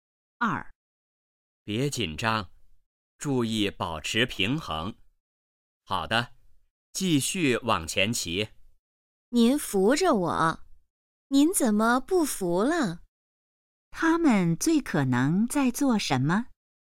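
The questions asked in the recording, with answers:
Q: 他们最可能在做什么?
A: 学骑自行车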